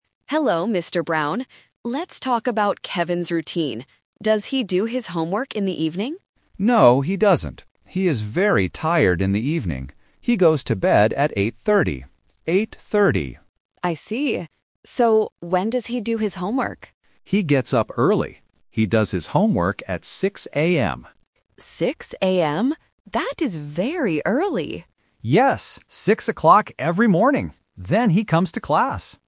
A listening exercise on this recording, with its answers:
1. What time does Kevin go to bed?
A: 8:30

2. When does Kevin do his homework?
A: In the morning

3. What time does Kevin do his homework?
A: 6:00 AM

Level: A1